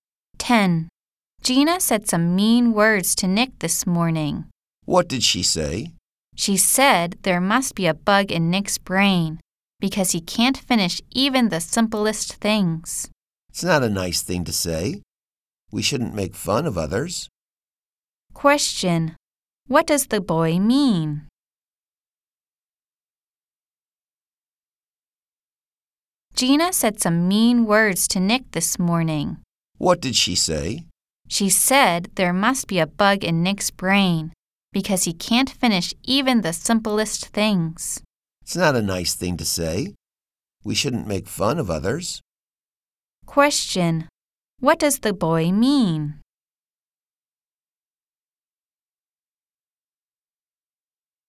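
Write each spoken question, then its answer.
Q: What does the boy mean?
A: We shouldn't make fun of others.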